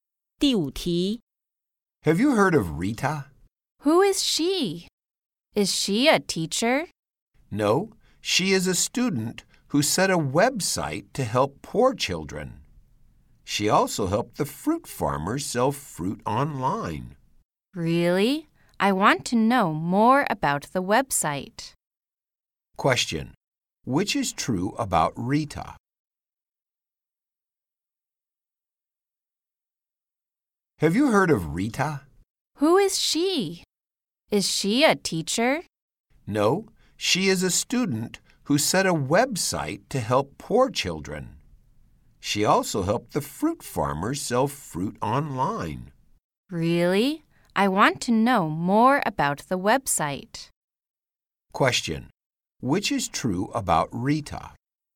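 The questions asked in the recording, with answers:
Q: Which is true about Rita?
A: She is a student who set up a website to help poor children.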